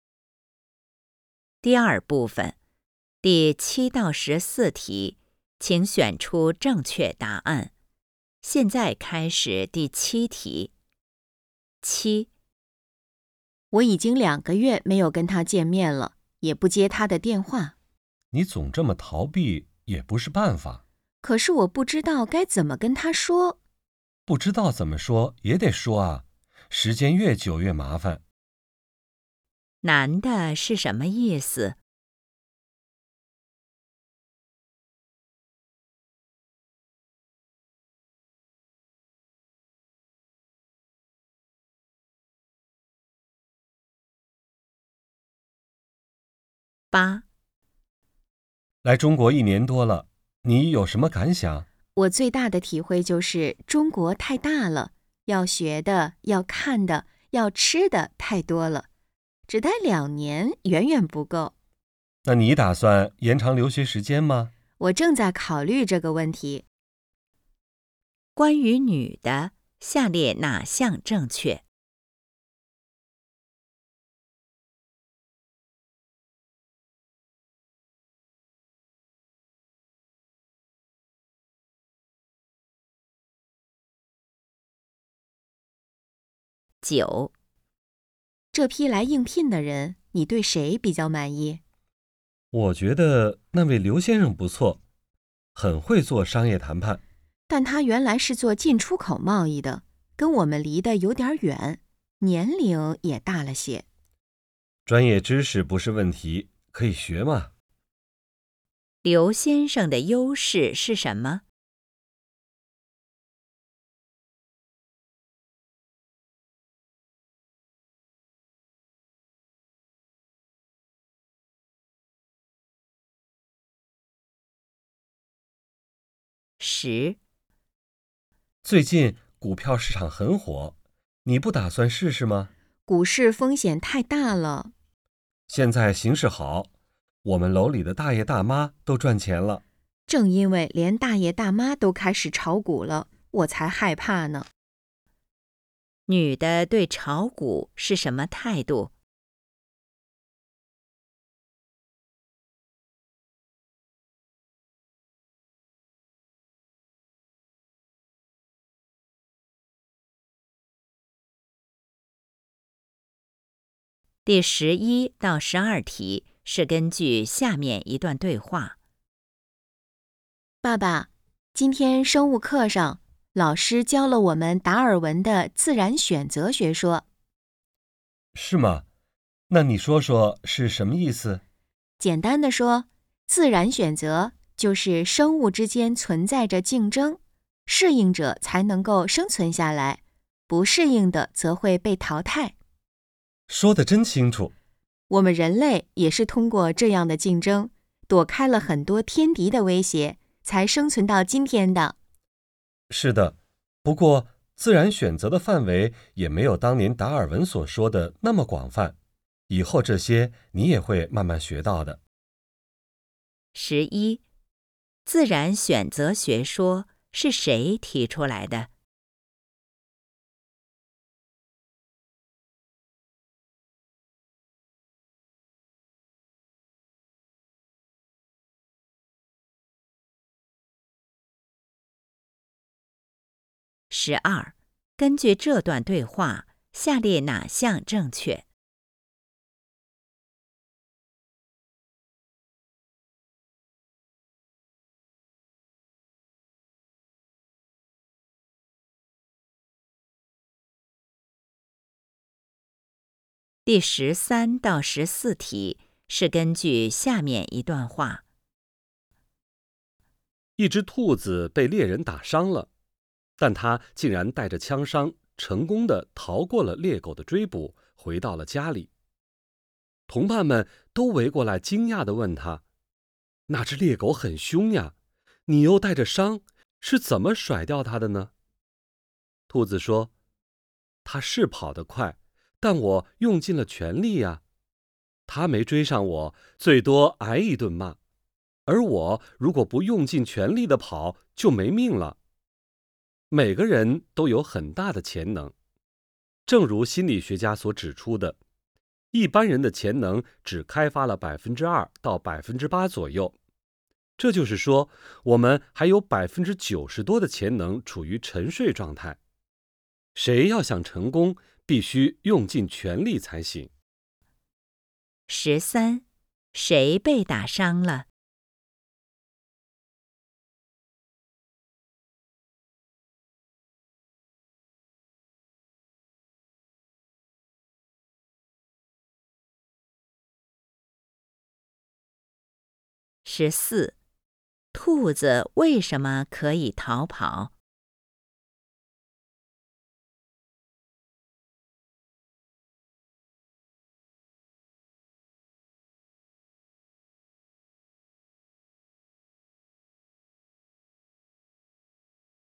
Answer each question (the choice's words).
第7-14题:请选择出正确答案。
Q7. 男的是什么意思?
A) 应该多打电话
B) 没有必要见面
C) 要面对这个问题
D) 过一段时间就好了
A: 要面对这个问题

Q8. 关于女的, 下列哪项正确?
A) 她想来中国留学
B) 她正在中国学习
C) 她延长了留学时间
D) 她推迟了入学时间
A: 她正在中国学习

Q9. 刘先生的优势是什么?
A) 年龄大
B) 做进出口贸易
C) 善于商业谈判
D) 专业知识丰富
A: 善于商业谈判

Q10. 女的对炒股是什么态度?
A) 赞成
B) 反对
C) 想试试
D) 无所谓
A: 反对

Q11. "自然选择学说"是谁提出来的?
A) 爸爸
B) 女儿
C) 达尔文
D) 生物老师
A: 达尔文

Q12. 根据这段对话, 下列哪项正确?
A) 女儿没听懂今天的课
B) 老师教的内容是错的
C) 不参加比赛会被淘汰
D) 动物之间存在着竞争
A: 动物之间存在着竞争

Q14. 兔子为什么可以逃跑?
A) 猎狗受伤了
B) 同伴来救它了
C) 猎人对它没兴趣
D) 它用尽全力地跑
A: 它用尽全力地跑

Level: HSK 5